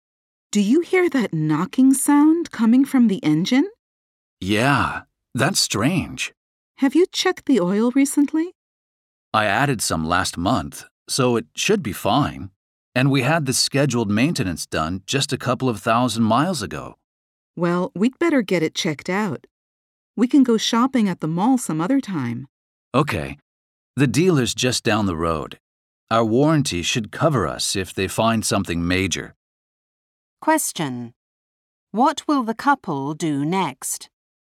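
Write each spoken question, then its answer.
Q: What will the couple do next?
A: Take the car to the dealer to have the engine checked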